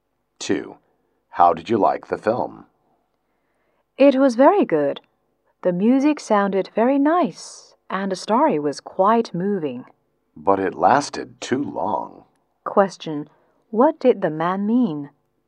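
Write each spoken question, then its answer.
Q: What did the man mean?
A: The film was good but too long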